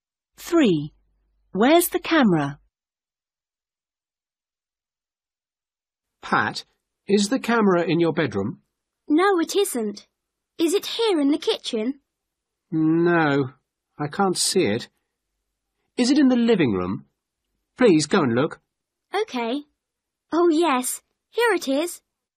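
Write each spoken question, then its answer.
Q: Where's the camera?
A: in the living room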